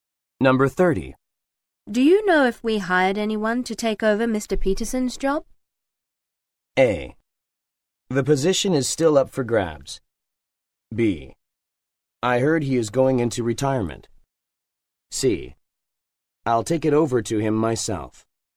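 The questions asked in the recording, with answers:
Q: Do you know if we hired anyone to take over Mr. Peterson's job?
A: A: The position is still up for grabs.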